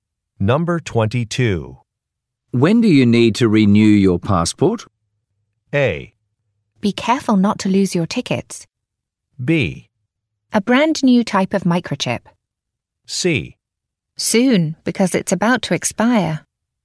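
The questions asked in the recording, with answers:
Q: When do you need to renew your passport?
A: C: Soon, because it's about to expire.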